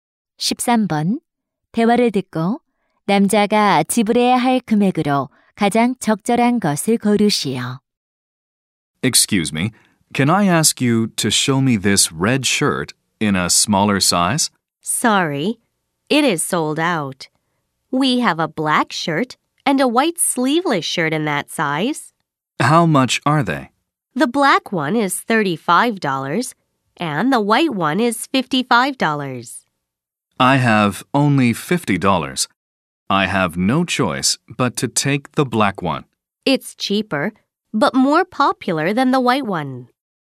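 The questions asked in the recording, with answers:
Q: 대화를 듣고 남자가 지불해야 할 금액으로 가장 적절한 것을 고르시오.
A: $35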